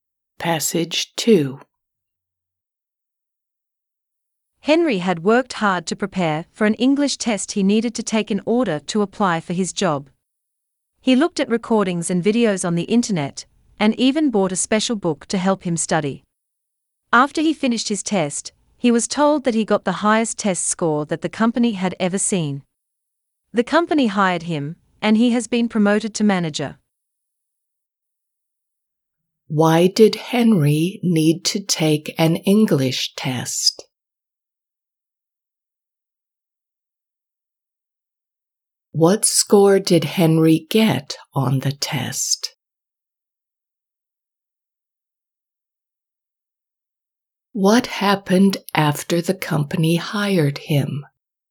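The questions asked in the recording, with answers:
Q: Why did Henry need to take an English test?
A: to apply for his job

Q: What score did Henry get on the test?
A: the highest score the company had ever seen

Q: What happened after the company hired him?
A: he was promoted to manager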